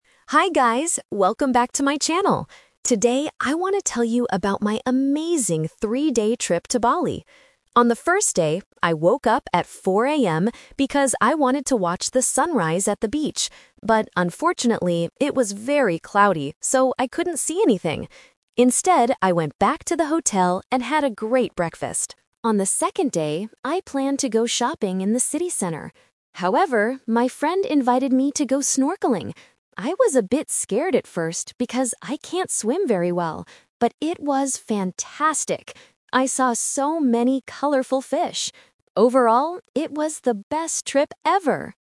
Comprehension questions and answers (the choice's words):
Listen to a travel vlogger talking about her trip to Bali. Choose the correct answer (A, B, or C) for each question.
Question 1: Why didn't the vlogger see the sunrise on the first day?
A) She woke up too late.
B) The weather was cloudy.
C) She stayed at the hotel.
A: The weather was cloudy.

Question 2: What did the vlogger actually do on the second day?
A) She went shopping in the city.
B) She went snorkeling with a friend.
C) She visited a famous beach.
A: She went snorkeling with a friend.

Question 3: How did the vlogger feel before she went snorkeling?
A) She was a bit scared.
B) She was very excited.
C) She thought it would be boring.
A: She was a bit scared.

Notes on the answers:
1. The vlogger says, "But unfortunately, it was very cloudy, so I couldn't see anything!" Option A is a plausible reason for missing a sunrise, but she actually woke up at 4 a.m. Option C is the trap: she went back to the hotel after trying to see the sunrise.
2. She says, "However, my friend invited me to go snorkeling... it was fantastic!" Option A is the trap: she "planned" to go shopping, but she didn't do it. Option C is not mentioned.
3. The vlogger explicitly states, "I was a bit scared at first because I can't swim very well..." Option B is the trap: she says it was "fantastic" later, but before the activity (at first), she was scared. Option C is plausible but not mentioned.

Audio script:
Vlogger: Hi guys, welcome back to my channel! Today, I want to tell you about my amazing three-day trip to Bali. On the first day, I woke up at 4 a.m. because I wanted to watch the sunrise at the beach. But unfortunately, it was very cloudy, so I couldn't see anything! Instead, I went back to the hotel and had a great breakfast. On the second day, I planned to go shopping in the city center. However, my friend invited me to go snorkeling. I was a bit scared at first because I can't swim very well, but it was fantastic! I saw so many colorful fish. Overall, it was the best trip ever!